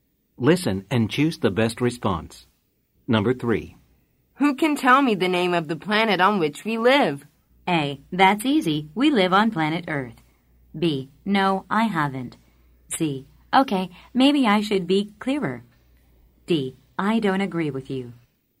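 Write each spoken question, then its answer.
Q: Who can tell me the name of the planet on which we live?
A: A: That's easy. We live on planet Earth.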